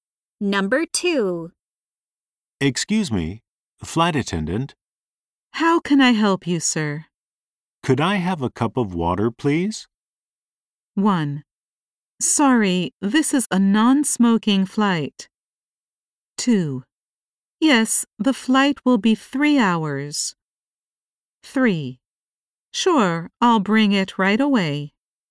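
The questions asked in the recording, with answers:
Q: Could I have a cup of water, please?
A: 3: Sure, I'll bring it right away.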